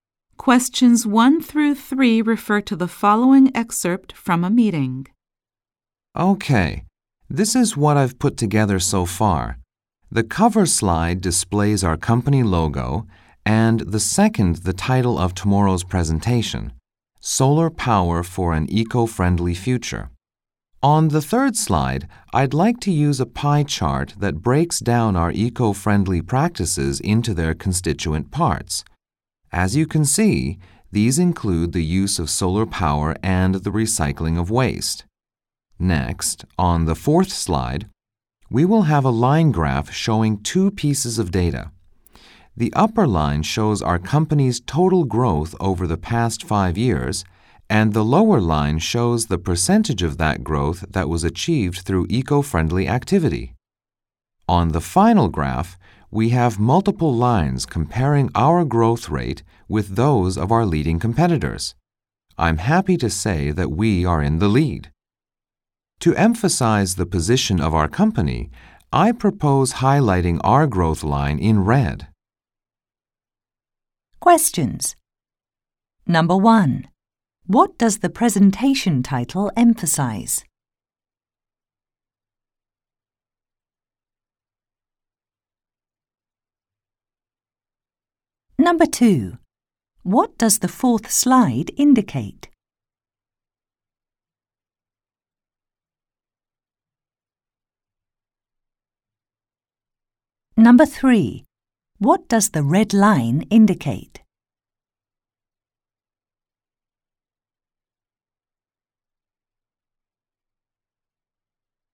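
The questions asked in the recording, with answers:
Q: What does the presentation title emphasize?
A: Solar power for an eco-friendly future

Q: What does the fourth slide indicate?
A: The company's total growth over 5 years and the share of it achieved through eco-friendly activity

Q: What does the red line indicate?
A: The company's own growth rate, which leads its competitors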